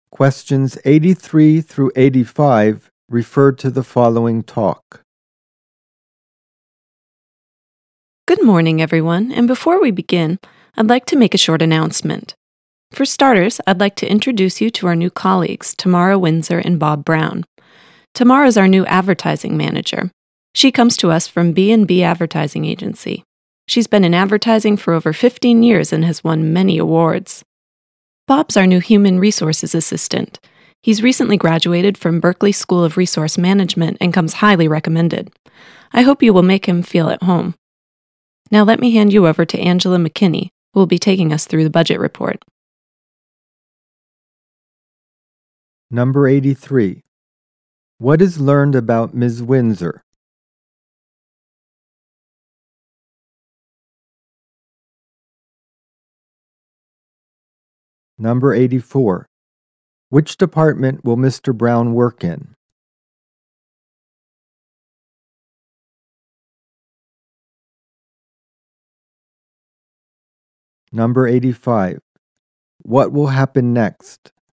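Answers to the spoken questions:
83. She has worked in advertising for over 15 years and won many awards.
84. Human resources
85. Angela McKinney will go through the budget report.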